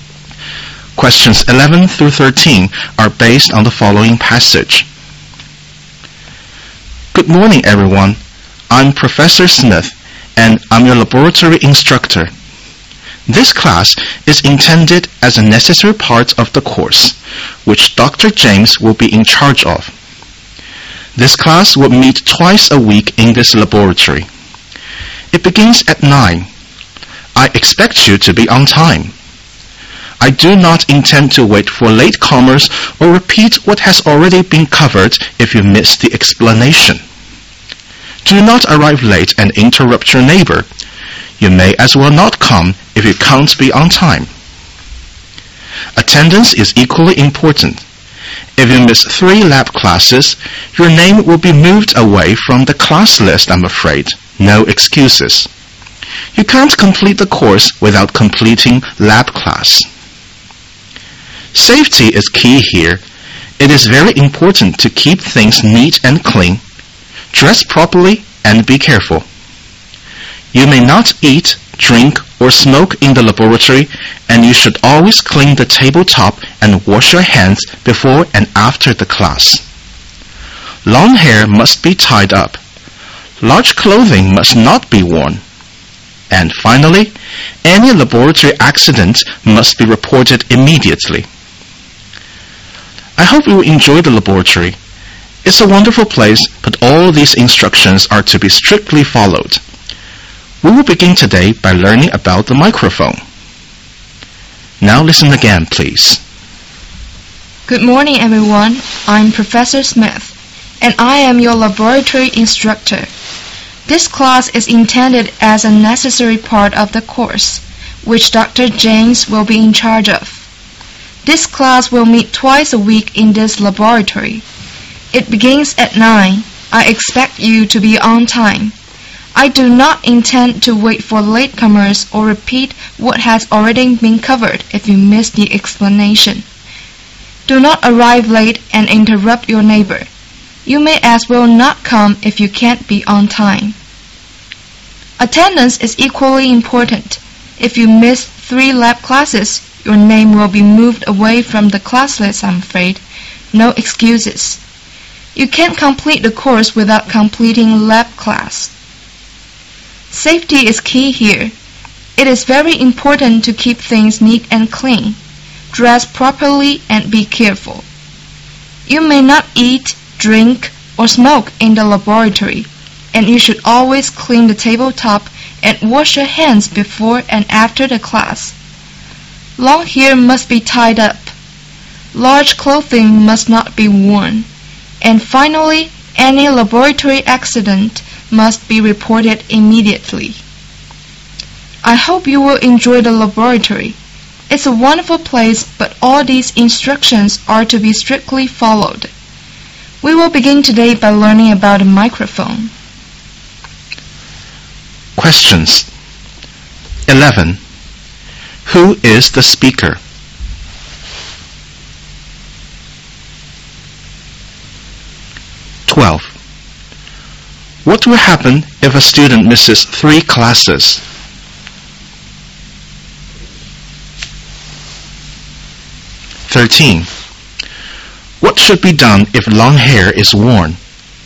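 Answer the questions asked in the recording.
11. A laboratory instructor
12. His name will be removed from the class list
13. It must be tied up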